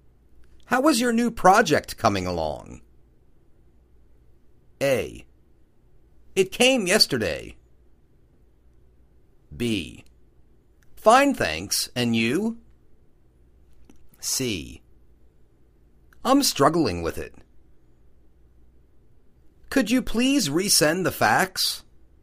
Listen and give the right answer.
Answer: I'm struggling with it.